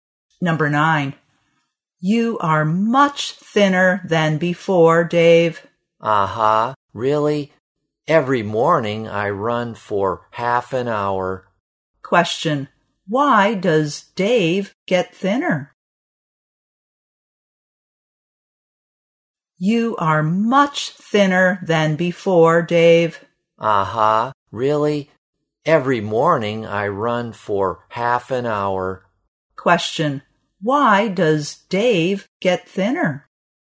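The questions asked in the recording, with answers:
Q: Why does Dave get thinner?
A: He runs for half an hour every morning.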